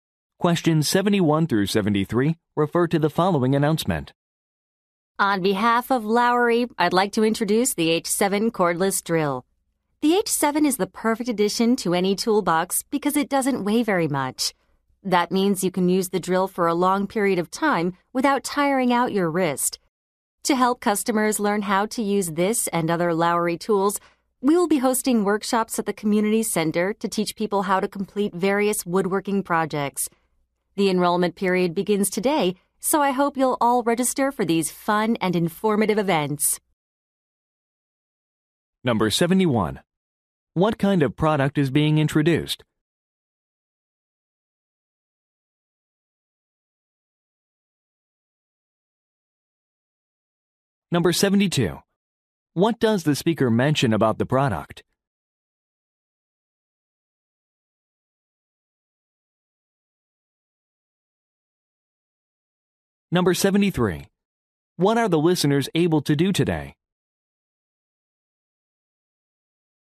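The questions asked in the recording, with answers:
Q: What kind of product is being introduced?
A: A cordless drill

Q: What does the speaker mention about the product?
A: It is lightweight

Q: What are the listeners able to do today?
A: Register for workshops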